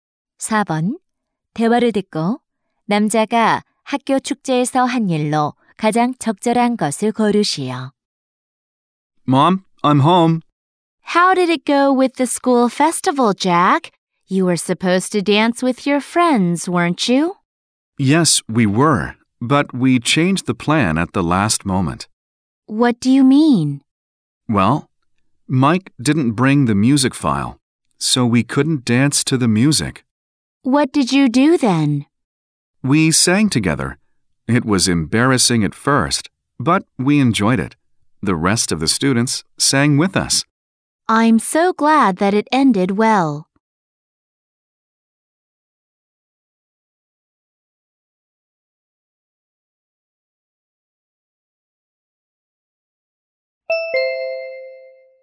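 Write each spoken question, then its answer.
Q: 대화를 듣고 남자가 학교 축제에서 한 일로 가장 적절한 것을 고르시오.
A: 친구들과 함께 노래를 불렀다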